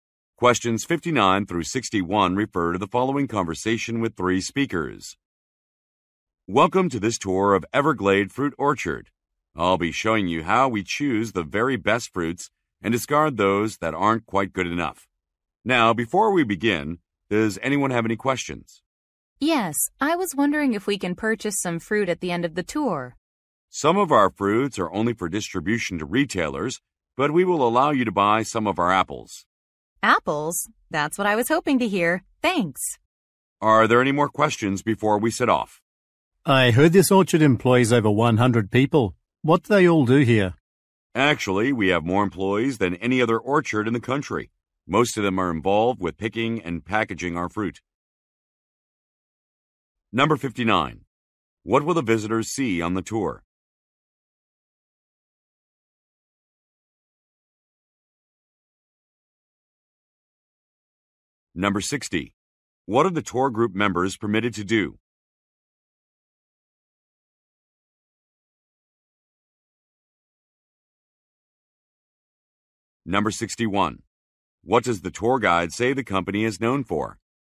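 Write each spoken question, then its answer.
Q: What will the visitors see on the tour?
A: How the best fruits are chosen and the others discarded

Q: What are the tour group members permitted to do?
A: Buy some apples

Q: What does the tour guide say the company is known for?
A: Having more employees than any other orchard in the country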